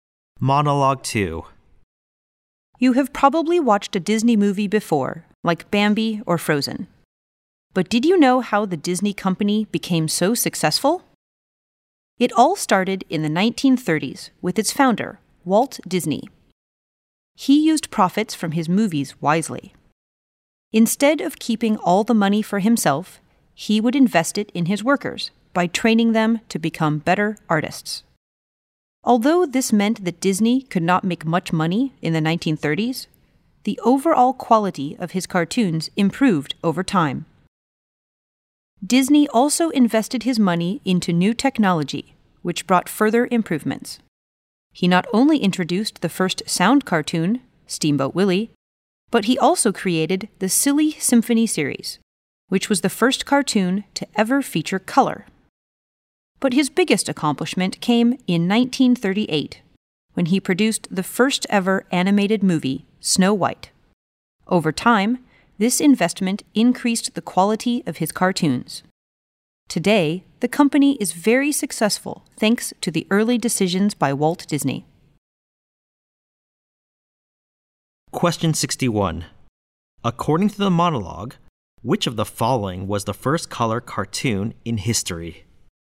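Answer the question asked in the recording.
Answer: Silly Symphony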